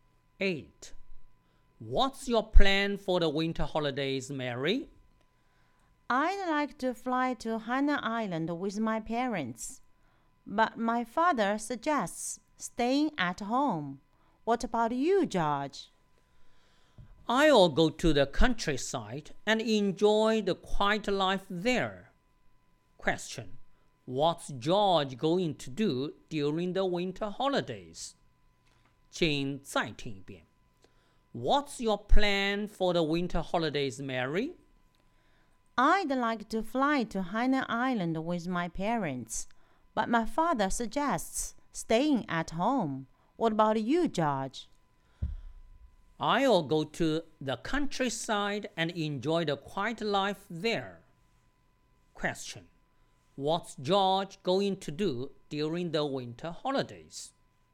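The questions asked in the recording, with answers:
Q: What's George going to do during the winter holidays?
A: Go to the countryside and enjoy the quiet life there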